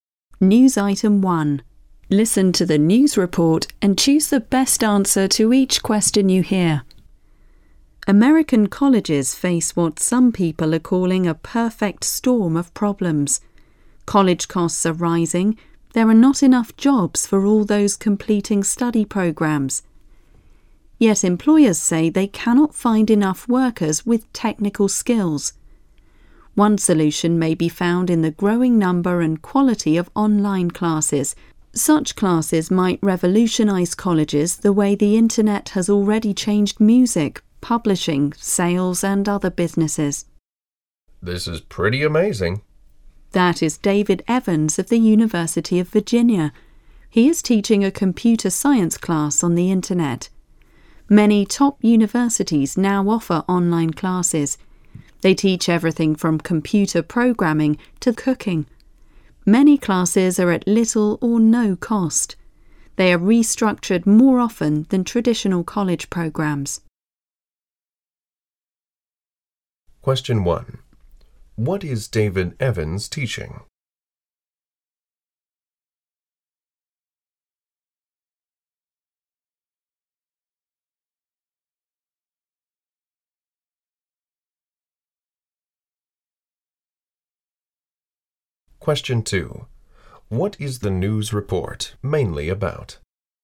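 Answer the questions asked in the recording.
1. A computer science class on the internet
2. Online classes as a possible solution to college problems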